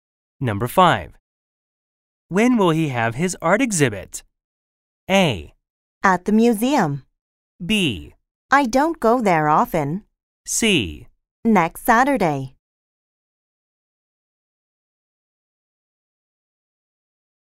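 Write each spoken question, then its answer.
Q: When will he have his art exhibit?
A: C: Next Saturday.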